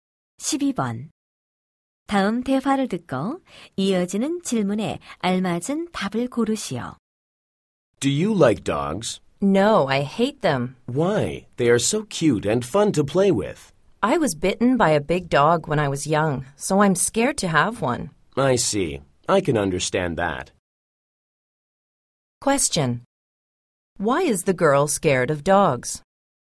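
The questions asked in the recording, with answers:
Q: Question. Why is the girl scared of dogs?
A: She was bitten by a big dog when she was young.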